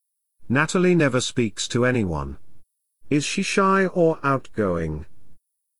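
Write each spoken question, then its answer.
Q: Is she shy or outgoing?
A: Shy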